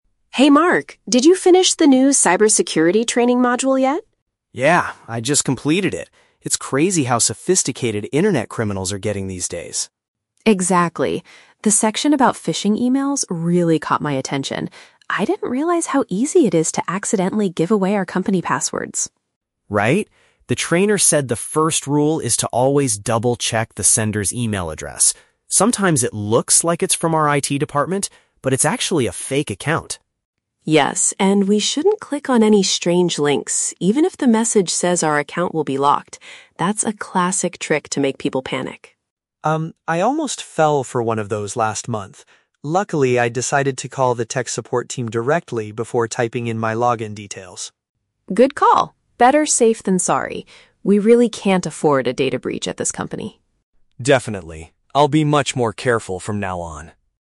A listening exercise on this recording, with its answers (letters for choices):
Listen to the conversation between two colleagues and choose the correct answer (A, B, or C) for each question.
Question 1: What is the main topic of their conversation?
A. How to create stronger passwords for their computers.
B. Methods to recognize dangerous messages at work.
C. A recent data breach caused by internet criminals.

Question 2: According to Mark, what is the first thing employees should do to stay safe?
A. Contact the technical support staff by phone.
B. Install a new security program on their devices.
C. Verify where the electronic mail originally came from.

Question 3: Why do scammers often send messages saying an account will be locked?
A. To make the victim feel frightened and act quickly.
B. Because the company's computer network is broken.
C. To force the managers to change the security rules.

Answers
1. B
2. C
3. A

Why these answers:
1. The Key: They are discussing a "cybersecurity training" on how to deal with "phishing emails" (dangerous messages) so they don't give away passwords. The Trap (C): Sarah mentions they "can't afford a data breach," which means they want to prevent one from happening. A data breach hasn't actually happened yet. Plausible but not mentioned (A): They talk about protecting "company passwords," but they don't discuss how to create stronger ones.
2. The Key: Mark says the first rule is to "double-check the sender's email address." This means you must verify where the email came from. The Trap (A): Mark mentions he decided to "call the tech support team" last month. However, this was a personal action he took, not the "first rule" taught in the training. Plausible but not mentioned (B): Installing security programs is a common cyber safety tip, but neither of them mentions doing this in the audio.
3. The Key: Sarah says telling someone their account will be locked is a "classic trick to make people panic." To panic means to feel very frightened and do things without thinking carefully. The Trap (B): The email says the account is locked, but Sarah points out this is just a "trick" (a lie). The company's network is not actually broken. Plausible but not mentioned (C): Scammers want to steal passwords, not force the managers to change company rules.

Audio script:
Sarah: Hey Mark, did you finish the new cybersecurity training module yet?
Mark: Yeah, I just completed it. It's crazy how sophisticated internet criminals are getting these days.
Sarah: Exactly. The section about phishing emails really caught my attention. I didn't realize how easy it is to accidentally give away our company passwords.
Mark: Right? The trainer said the first rule is to always double-check the sender's email address. Sometimes it looks like it's from our IT department, but it's actually a fake account.
Sarah: Yes, and we shouldn't click on any strange links, even if the message says our account will be locked. That's a classic trick to make people panic.
Mark: Um, I almost fell for one of those last month. Luckily, I decided to call the tech support team directly before typing in my login details.
Sarah: Good call! Better safe than sorry. We really can't afford a data breach at this company.
Mark: Definitely. I'll be much more careful from now on.